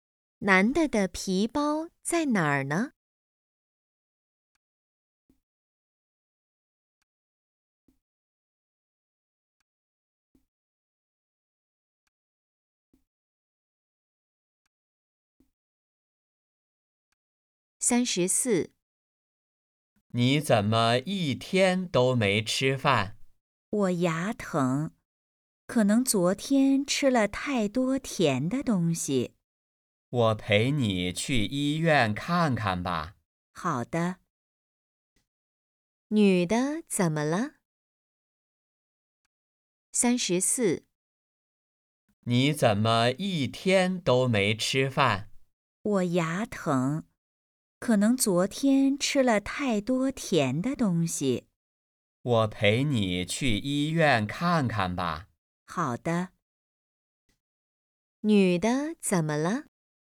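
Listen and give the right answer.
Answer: 牙疼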